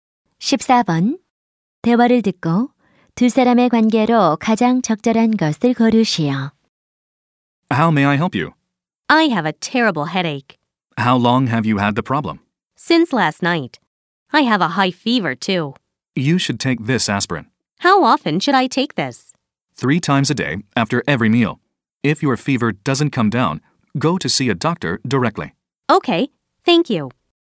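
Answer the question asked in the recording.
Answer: 약사와 손님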